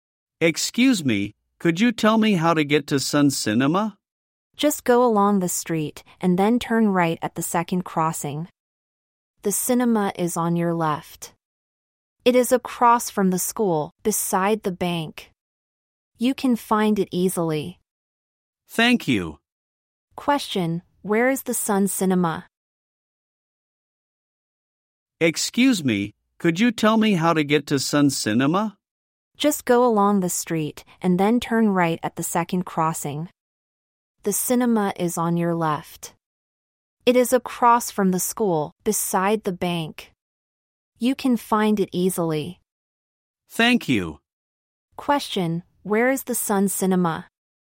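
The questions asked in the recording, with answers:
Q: Question, where is the Sun Cinema?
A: Across from the school, beside the bank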